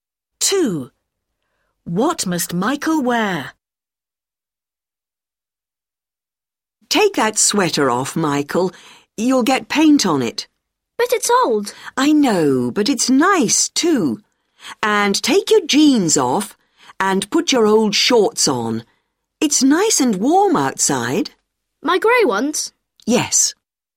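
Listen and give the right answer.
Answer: his old grey shorts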